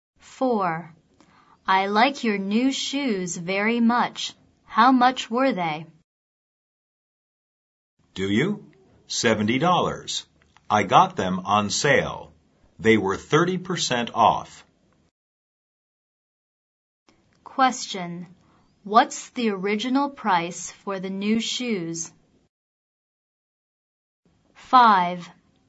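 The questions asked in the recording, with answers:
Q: What's the original price for the new shoes?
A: $100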